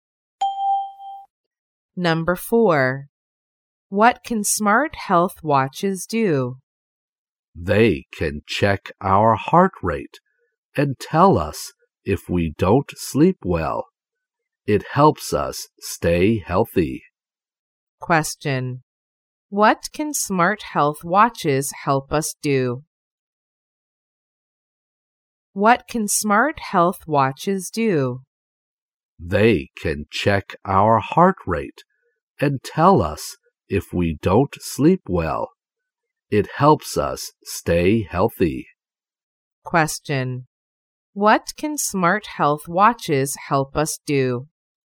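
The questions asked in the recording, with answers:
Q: What can smart health watches help us do?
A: Stay healthy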